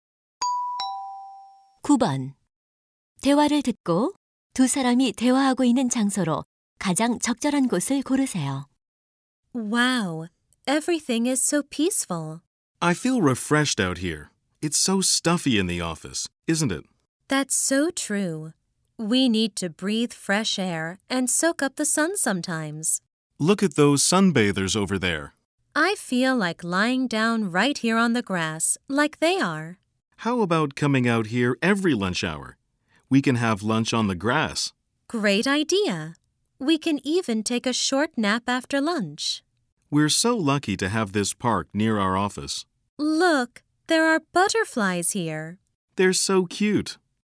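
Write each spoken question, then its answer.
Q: 대화를 듣고 두 사람이 대화하고 있는 장소로 가장 적절한 곳을 고르세요.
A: 공원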